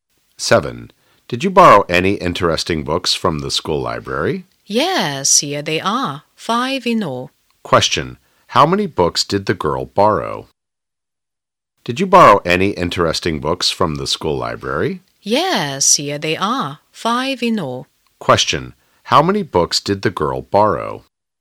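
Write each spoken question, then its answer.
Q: How many books did the girl borrow?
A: Five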